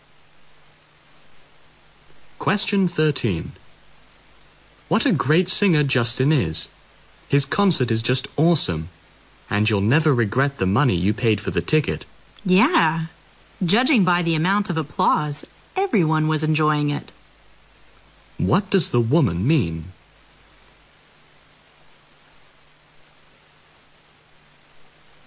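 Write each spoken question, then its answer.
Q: What does the woman mean?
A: Everyone enjoyed Justin's concert.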